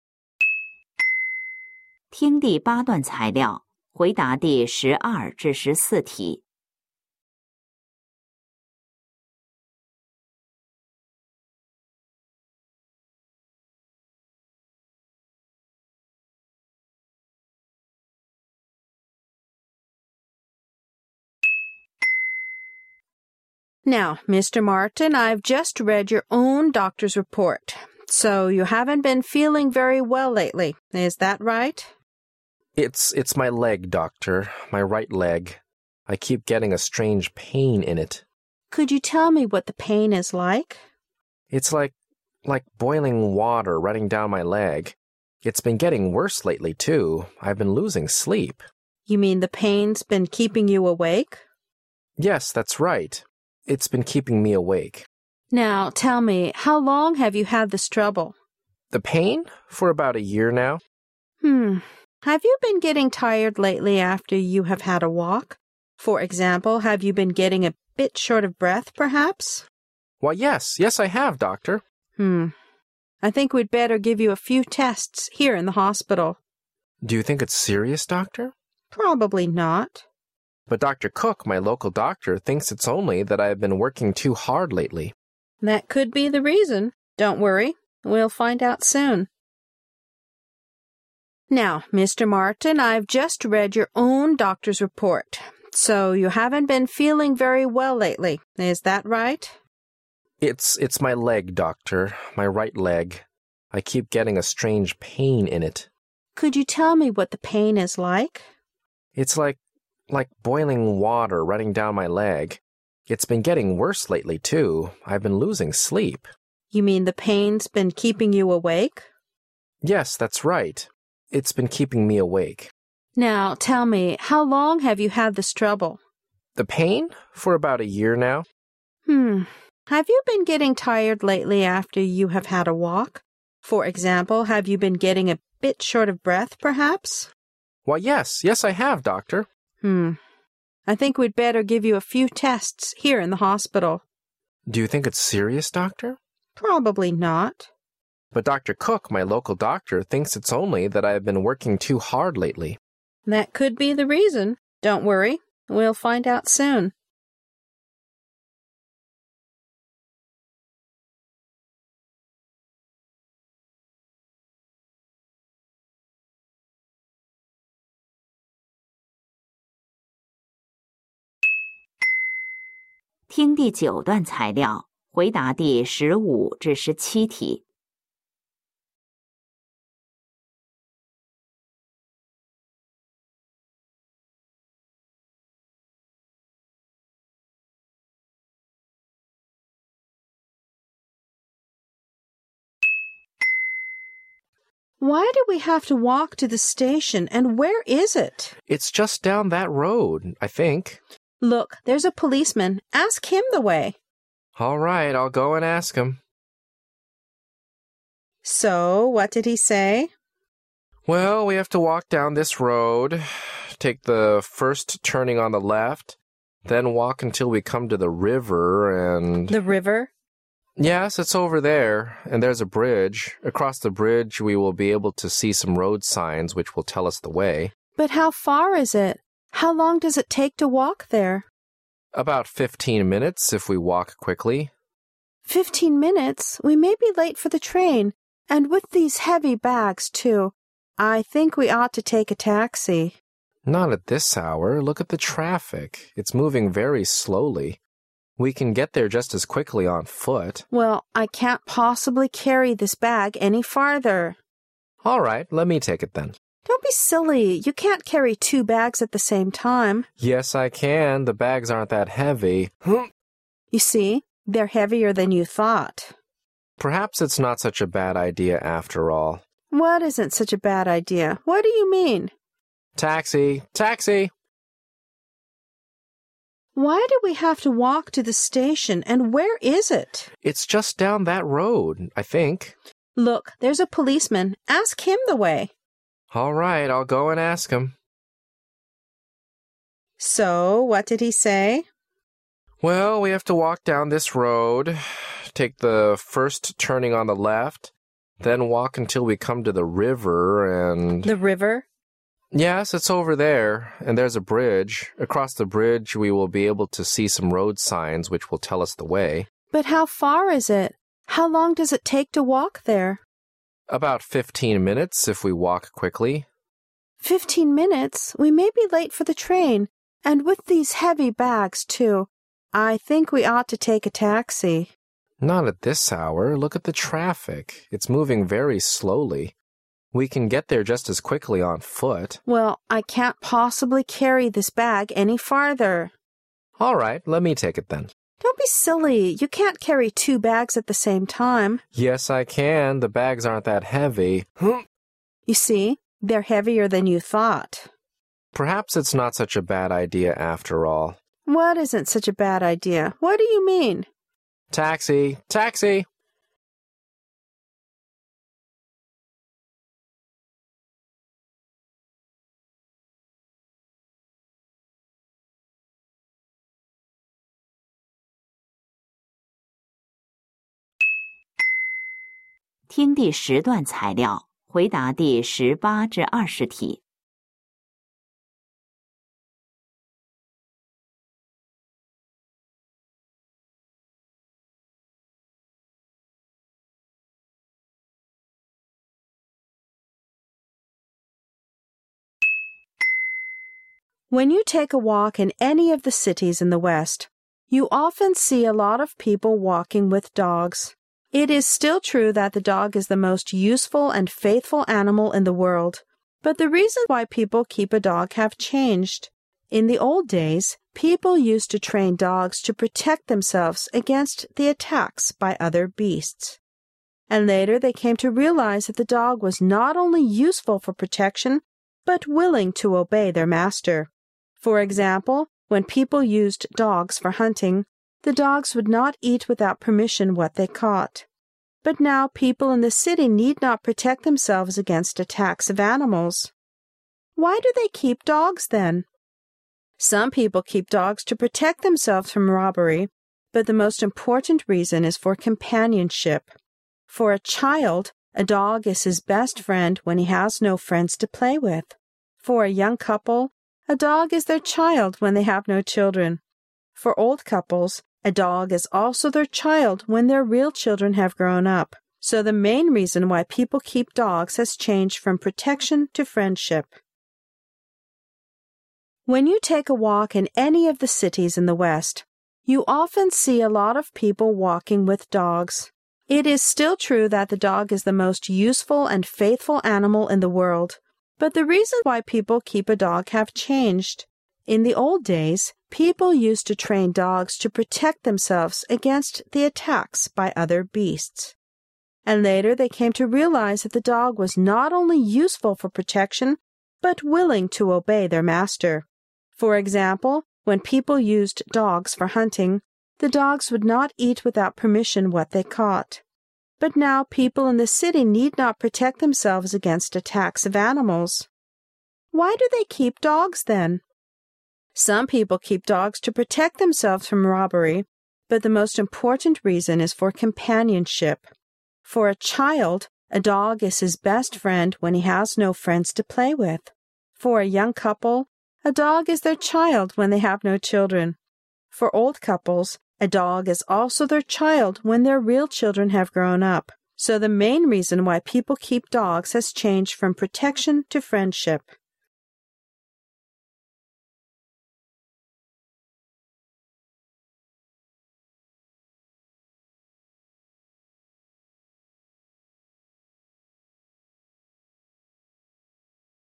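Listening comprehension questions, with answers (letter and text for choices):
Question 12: What is NOT true about the man?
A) Water is running down his leg.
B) He can not breathe well after a walk.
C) He hasn't been sleeping well because of the pain in his leg.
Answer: A) Water is running down his leg.

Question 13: What has caused the trouble?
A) The woman doesn't know yet.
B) He was burnt by boiling water.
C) He has tired himself out in his work.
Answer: A) The woman doesn't know yet.

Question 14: What's the woman's name?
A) Doctor Cook.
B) Doctor Martin.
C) The conversation doesn't tell us.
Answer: C) The conversation doesn't tell us.

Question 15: Where are the man and the w oman going?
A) To the bus station.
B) To the police station.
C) To the railway station.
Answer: C) To the railway station.

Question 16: What does the woman think they should do?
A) Take a taxi.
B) Walk slowly.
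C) Leave the bags with the police.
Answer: A) Take a taxi.

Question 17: What does the man find out at last?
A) Fifteen minutes is too long.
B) The traffic is moving too slowly.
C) He i s not able to carry two bags.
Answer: C) He i s not able to carry two bags.

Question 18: According to the passage,what were dogs trained for in the past?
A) For protection against other animals.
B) For protection against other dogs.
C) Just for fun.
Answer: A) For protection against other animals.

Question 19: Why were dogs used for hunting?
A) Because they did not eat other animals.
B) Because they were useful for protection.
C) Because they always obeyed their masters.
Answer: C) Because they always obeyed their masters.

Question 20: What is the most important reason for people in the city to keep dogs now?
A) For companionship.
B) For amusement.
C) For protection against robbery.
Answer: A) For companionship.

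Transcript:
M:Well,that's another long story.I'll tell you later.
W :Now,Mr.Martin.I've just read your own doctor's report.So you haven't been feeling very well lately,is that right?
M:It's...it's my leg,doctor.My right leg.I keep getting a strange pain in it.
W:Could you tell me what the pain is like?
M:It's like....like boiling water running down my leg.It's been getting worse lately,too.I've been losing sleep .
W:You mean the pain's been keeping you awake?
M:Yes,that's right.It's been keeping me awake.
W:Now,tell me,how long have you had this trouble?
M:The pain? For about a year now.
W:Hmm...Have you been getting tired lately after you have had a walk? For example,have you been getting a big sh ort of breath,perhaps?
M:Why,yes! Yes,I have,doctor!
W:Hmm...I think we'd better give you a few tests here in the hospital.
M:Do you think it's serious,doctor?
W:Probably not.
But...Doctor Cook,my local doctor,thinks it's only that I've been working too hard lately.
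W:That could be the reason.Don't worry,we'll find out soon.
W :Why do we have to walk to the station? And where is it?
M:It's just down that road...I think.
W:Look! There's a policeman! Ask him the way.
M:All right.I'll go and ask him.
W:So,what did he say?
M:W ell,we have to walk down this road,take the first tu rning on the left.Then walk until we come to the river and...
W:The river?
M:Yes.It's over there,and there's a bridge.Across the bridge,we will be able to see some road signs which will tell us the way.
W:But how far is it? How long does it take to walk there?
M:About fifteen minutes,if we walk quickly.
We may be late for the train.And with these heavy bags,too! I think we ought to take a taxi.
M:Not at this hour.Look at the traffic.It's moving very slowly.We can get there just as quickly on foot.
W:Well,I can't possibly carry this bag any farther.
M:All right.Let me take it,then.
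W:Don't be silly.You can't carry two bags at the same time.
M:Yes,I can.The bags aren't that heavy...hmm!
W:You see! They're heavier than you thought!
M:Perhaps it's not such a bad idea after all.
W:What isn't such a bad idea? What do you mean?
M:Taxi! Taxi!
When you take a walk a in any of the cities in the west, you often see a lot of people walking with dogs.It is still true that the dog is the most useful and faithful animal in the world .But the reason why people keep a dog have changed ,In the old days ,people used to train dogs to protect themselves against the attacks by other besasts.And later they came to realize that the dog was ont only us eful for protection but willing to obey their master. For example, when people used dogs for hunting,the dogs would not eat without permission what they caught.But now people in the city need not protect themselves against attacks of animals.Why do they keep dogs then? 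Some people keep dogs to protect themselves from robbery,but the most important reason is fo r companionship.For a child,a dog is his best friend when he has no friends to play with; for a young couple,a dog is their child when they have no children; for old couples,a dog is also their child when their real children have grown up.So the main reason why people keep dogs has changed from protection to friendship.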